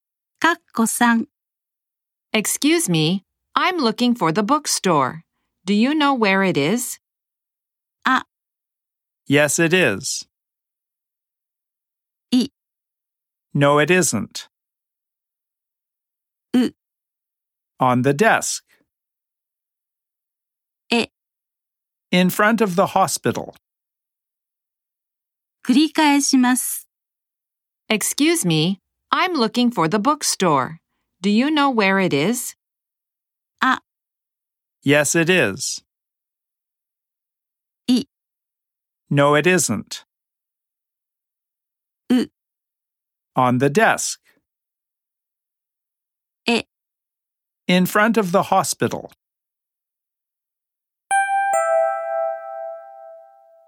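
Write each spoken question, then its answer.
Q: Excuse me, I'm looking for the bookstore. Do you know where it is?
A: え: In front of the hospital.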